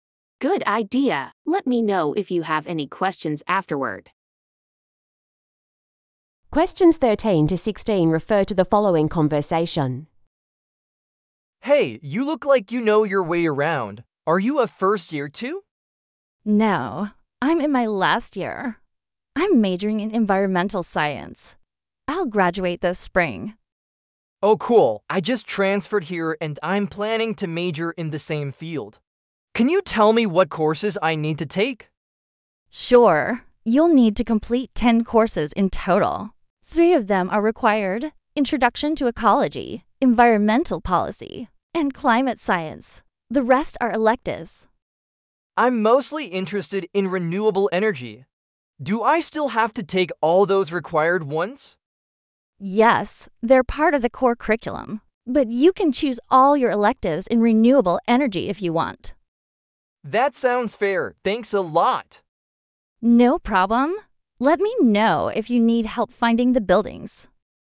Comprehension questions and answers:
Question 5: What is the woman's current academic year?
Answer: Final-year student.

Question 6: What does the man want to know?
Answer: Which courses are required for his major.

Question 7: How many total courses are needed for the major?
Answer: Ten.

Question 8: What is this talk about?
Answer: Course requirements for an Environmental Science major.

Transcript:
Man: Hey, you look like you know your way around. Are you a first-year too?
Woman: No, I'm in my last year. I'm majoring in Environmental Science. I'll graduate this spring.
Man: Oh cool. I just transferred here and I'm planning to major in the same field. Can you tell me what courses I need to take?
Woman: Sure. You'll need to complete ten courses in total. Three of them are required: "Introduction to Ecology," "Environmental Policy," and "Climate Science." The rest are electives.
Man: I'm mostly interested in renewable energy. Do I still have to take all those required ones?
Woman: Yes, they're part of the core curriculum. But you can choose all your electives in renewable energy if you want.
Man: That sounds fair. Thanks a lot!
Woman: No problem. Let me know if you need help finding the buildings.